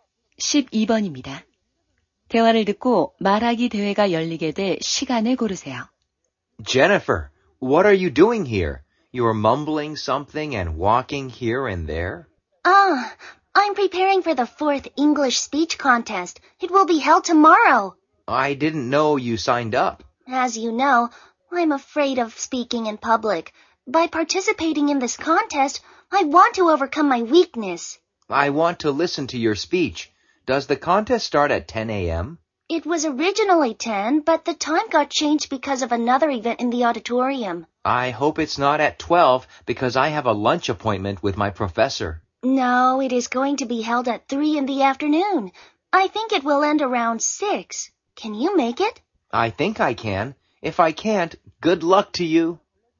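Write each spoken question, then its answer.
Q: 대화를 듣고 말하기 대회가 열리게 돼 시간을 고르세요.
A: 오후 3시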